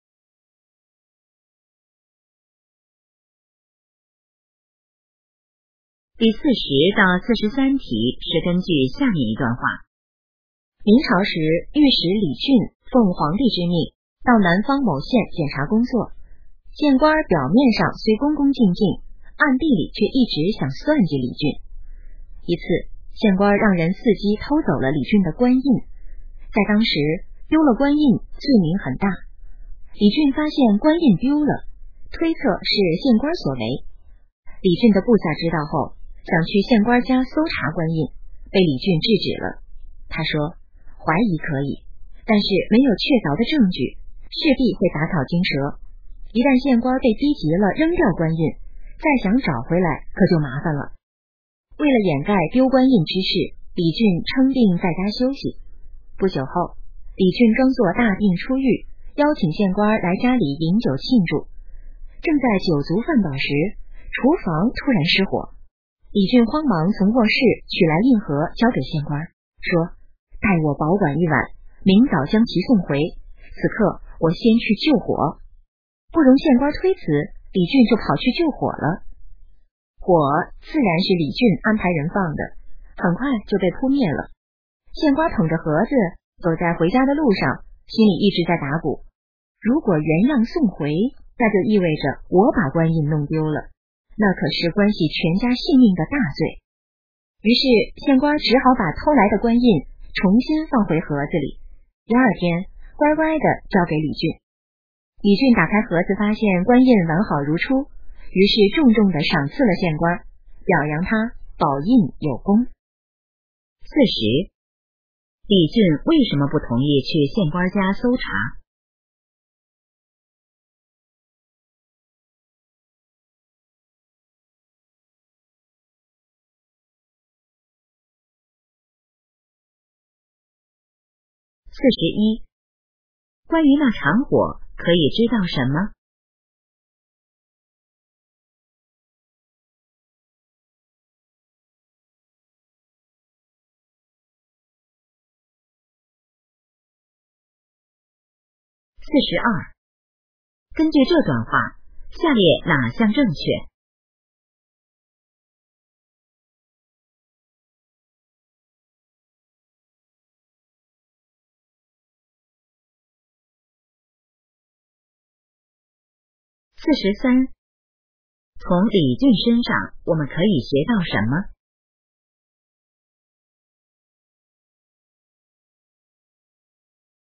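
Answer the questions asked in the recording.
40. 没有确凿证据,会打草惊蛇
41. 是李俊安排人放的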